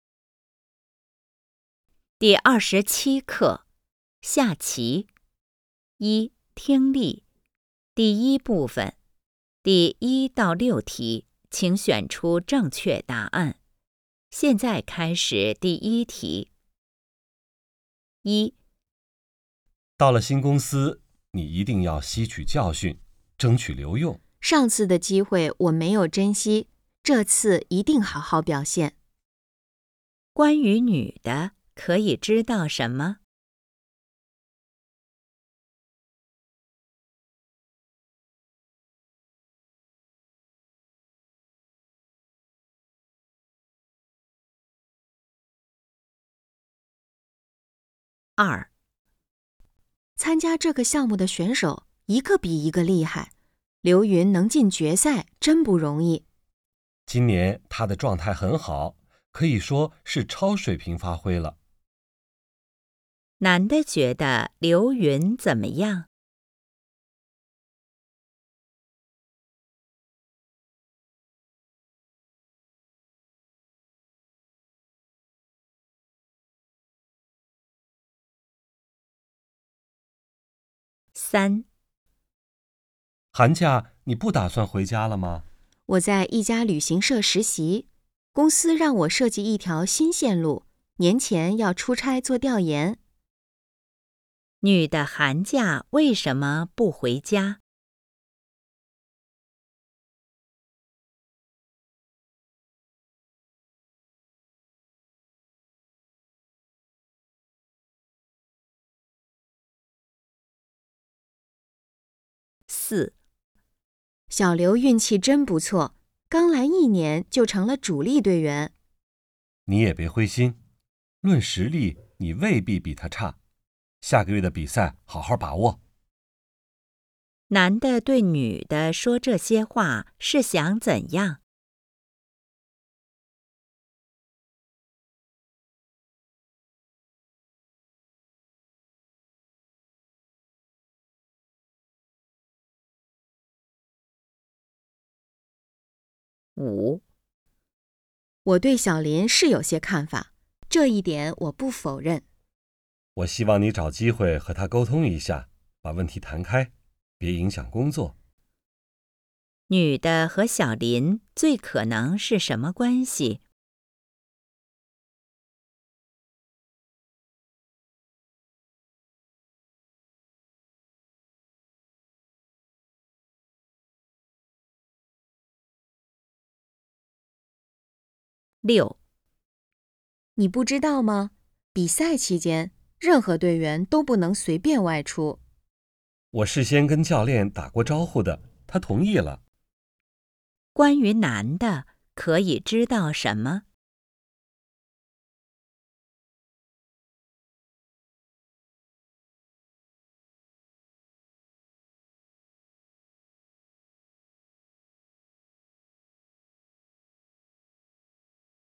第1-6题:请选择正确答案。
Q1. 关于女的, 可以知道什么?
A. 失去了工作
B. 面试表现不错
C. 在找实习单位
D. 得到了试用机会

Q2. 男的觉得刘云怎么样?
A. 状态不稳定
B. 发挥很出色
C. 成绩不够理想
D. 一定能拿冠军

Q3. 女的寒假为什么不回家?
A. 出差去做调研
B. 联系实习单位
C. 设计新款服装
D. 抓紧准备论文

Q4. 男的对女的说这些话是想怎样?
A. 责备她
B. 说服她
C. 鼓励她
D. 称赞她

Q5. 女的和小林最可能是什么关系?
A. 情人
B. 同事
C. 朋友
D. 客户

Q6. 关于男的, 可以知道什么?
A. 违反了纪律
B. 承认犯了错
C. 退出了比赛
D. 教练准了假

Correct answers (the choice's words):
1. 得到了试用机会
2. 发挥很出色
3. 出差去做调研
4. 鼓励她
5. 同事
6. 教练准了假

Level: HSK 5